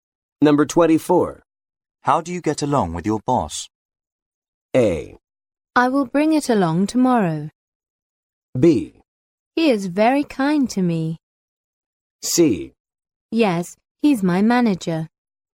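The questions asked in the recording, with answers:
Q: How do you get along with your boss?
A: B: He is very kind to me.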